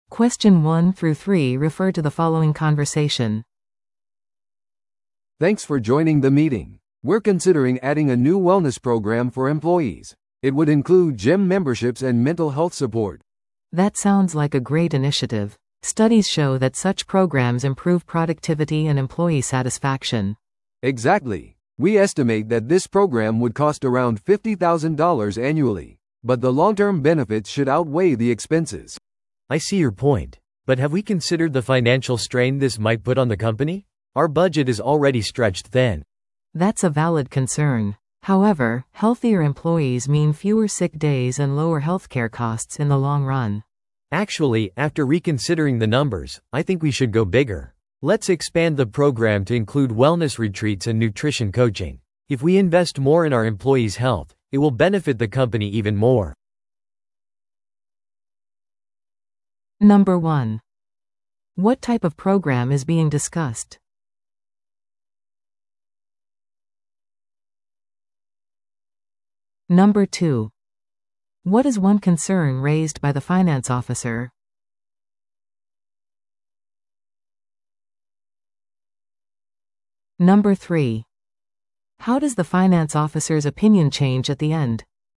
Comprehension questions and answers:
Listen to the audio below and answer the questions.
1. What type of program is being discussed?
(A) リーダーシップ研修プログラム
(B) 福利厚生プログラム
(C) 販売インセンティブプログラム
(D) 退職プラン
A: (B) 福利厚生プログラム

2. What is one concern raised by the finance officer?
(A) 従業員の参加率が低いかもしれない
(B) 会社の予算がすでに厳しい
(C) プログラムが複雑すぎる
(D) 他の企業では実施されていない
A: (B) 会社の予算がすでに厳しい

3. How does the finance officer's opinion change at the end?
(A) プログラムを中止することを決定した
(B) プログラムをさらに拡大することを提案した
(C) コスト削減を推奨した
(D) 別のタイプのプログラムを提案した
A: (B) プログラムをさらに拡大することを提案した

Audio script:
A: "Thanks for joining the meeting. We're considering adding a new wellness program for employees. It would include gym memberships and mental health support."
B: "That sounds like a great initiative. Studies show that such programs improve productivity and employee satisfaction."
A: "Exactly. We estimate that this program would cost around $50,000 annually. But the long-term benefits should outweigh the expenses."
C: "I see your point. But have we considered the financial strain this might put on the company? Our budget is already stretched thin."
B: "That's a valid concern. However, healthier employees mean fewer sick days and lower healthcare costs in the long run."
C: "Actually, after reconsidering the numbers, I think we should go bigger. Let's expand the program to include wellness retreats and nutrition coaching. If we invest more in our employees' health, it will benefit the company even more."

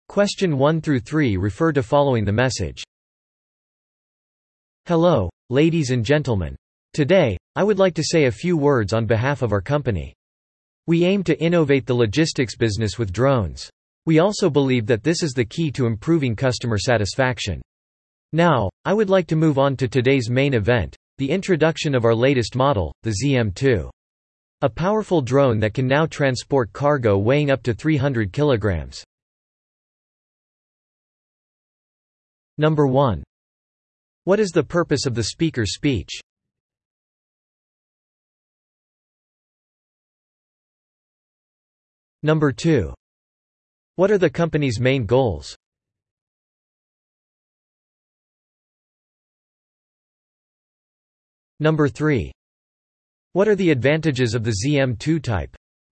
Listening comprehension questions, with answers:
Listen to the audio below and answer the questions.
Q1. What is the purpose of the speaker's speech?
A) ZM-2 ドローン モデルの紹介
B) 聴衆に感謝すること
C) ロジスティクス事業の歴史の紹介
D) 新規ビジネスの紹介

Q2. What are the company's main goals?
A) 拠点を増やす事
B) 電気自動車の開発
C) ドローンによる物流ビジネスの革新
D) 車にAIを搭載すること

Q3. What are the advantages of the ZM-2 type?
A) バッテリーが長持ち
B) 水素で動く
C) 300kg までの貨物を輸送できる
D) デザインが先進的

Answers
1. A) ZM-2 ドローン モデルの紹介
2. C) ドローンによる物流ビジネスの革新
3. C) 300kg までの貨物を輸送できる

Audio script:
"Hello, ladies and gentlemen. Today, I would like to say a few words on behalf of our company.
We aim to innovate the logistics business with drones.
We also believe that this is the key to improving customer satisfaction.
Now, I would like to move on to today's main event, the introduction of our latest model, the ZM-2.
A powerful drone that can now transport cargo weighing up to 300kg."

